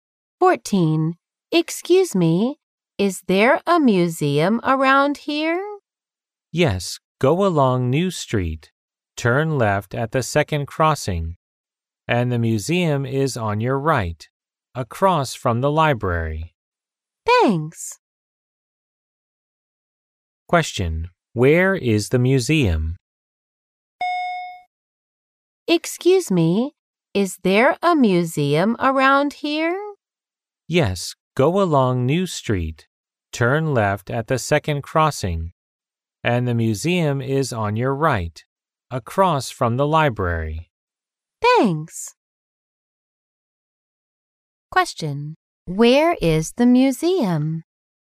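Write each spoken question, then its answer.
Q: Where is the museum?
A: Across from the library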